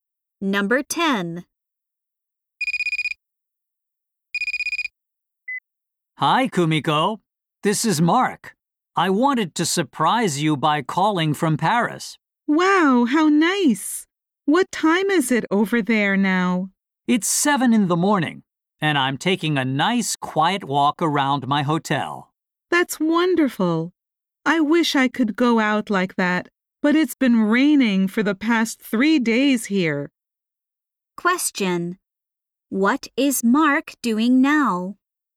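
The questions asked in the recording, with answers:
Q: What is Mark doing now?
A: Taking a walk around his hotel in Paris.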